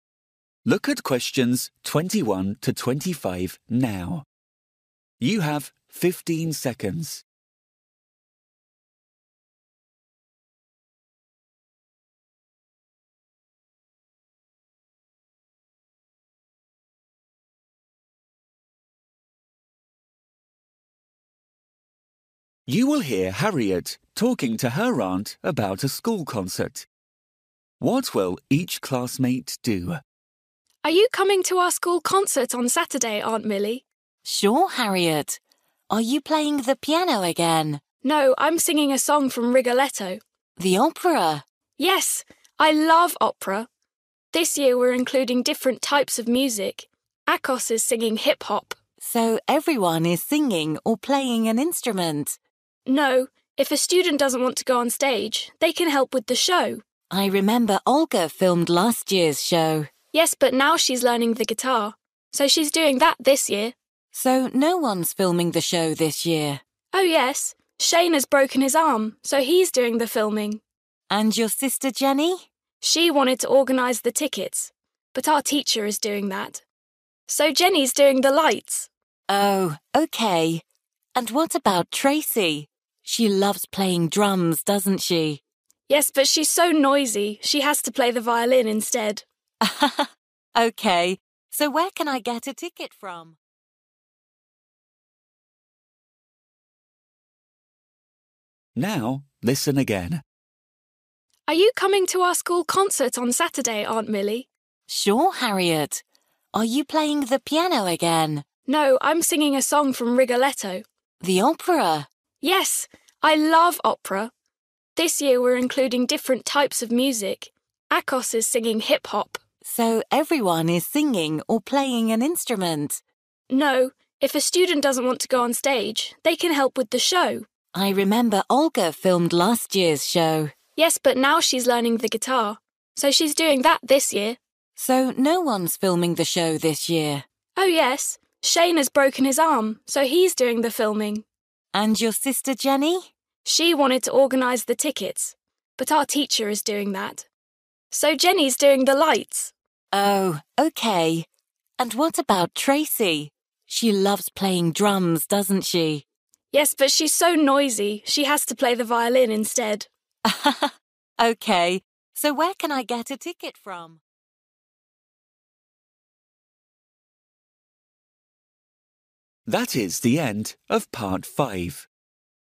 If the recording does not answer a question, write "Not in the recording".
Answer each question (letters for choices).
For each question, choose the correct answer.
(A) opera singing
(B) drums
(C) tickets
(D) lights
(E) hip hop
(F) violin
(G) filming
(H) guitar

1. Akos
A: E

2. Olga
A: H

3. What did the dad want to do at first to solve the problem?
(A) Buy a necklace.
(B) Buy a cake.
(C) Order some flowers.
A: Not in the recording

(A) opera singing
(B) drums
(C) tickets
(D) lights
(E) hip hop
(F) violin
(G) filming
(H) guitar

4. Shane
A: G

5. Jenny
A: D

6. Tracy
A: F

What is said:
Harriet: Are you coming to our school concert on Saturday, Aunt Milly?
Milly: Sure, Harriet. Are you playing the piano again?
Harriet: No, I'm singing a song from 'Rigoletto'.
Milly: The opera?
Harriet: Yes. I love opera! This year we're including different types of music. Akos is singing hip-hop.
Milly: So, everyone is singing or playing an instrument?
Harriet: No. If a student doesn't want to go on stage, they can help with the show.
Milly: I remember Olga filmed last year's show.
Harriet: Yes, but now she's learning the guitar, so she's doing that this year.
Milly: So, no one's filming the show this year?
Harriet: Oh yes. Shane has broken his arm so he's doing the filming.
Milly: And your sister Jenny?
Harriet: She wanted to organise the tickets, but our teacher is doing that. So Jenny's doing the lights.
Milly: Oh, OK! And what about Tracy? She loves playing drums, doesn't she?
Harriet: Yes, but she's so noisy she has to play the violin instead.
Milly: Ha ha! OK, so where can I get a ticket from?

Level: KET (A2)